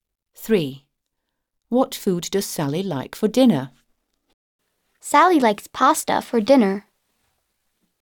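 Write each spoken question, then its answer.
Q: What food does Sally like for dinner?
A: pasta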